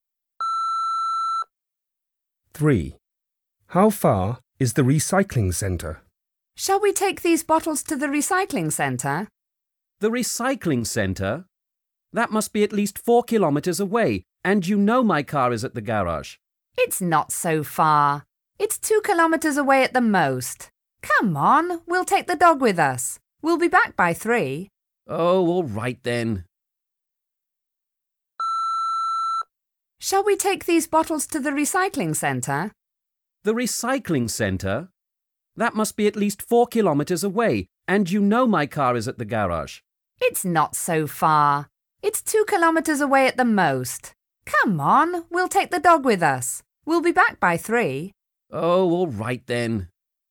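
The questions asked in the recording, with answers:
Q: How far is the recycling center?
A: 2 kilometres at the most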